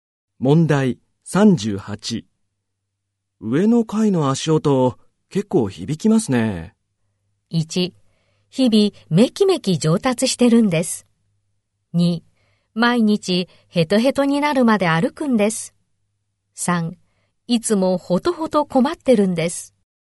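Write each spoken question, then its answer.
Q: 上の階の足音、結構響きますね。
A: 3: いつもほとほと困ってるんです。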